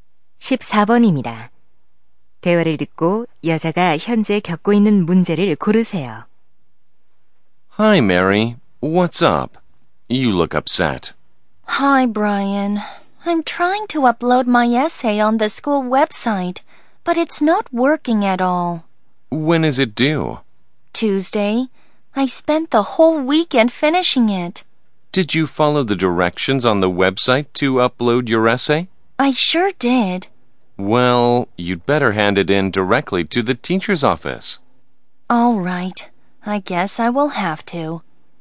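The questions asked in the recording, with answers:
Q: 대화를 듣고 여자가 현재 겪고 있는 문제를 고르세요.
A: 학교 웹사이트에 에세이가 업로드되지 않음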